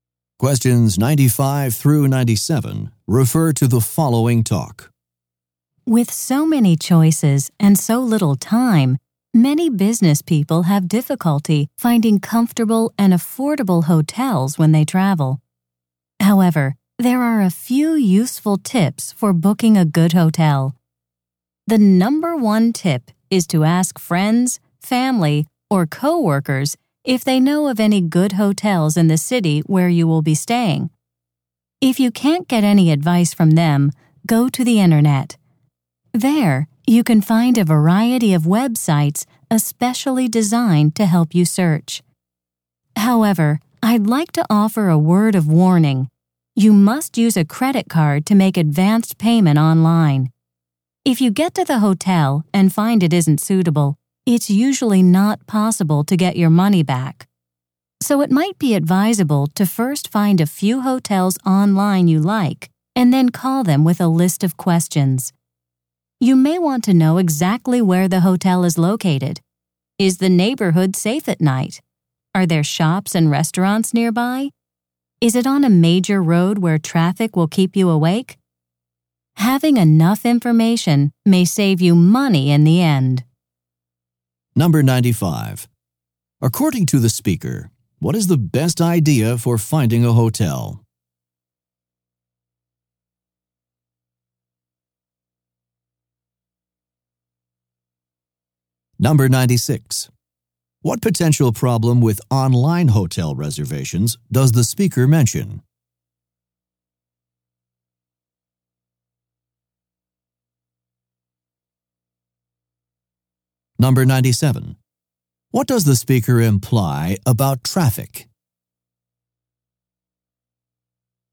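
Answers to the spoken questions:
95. Ask friends, family, or coworkers
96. You usually can't get your advance payment back
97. It may keep you awake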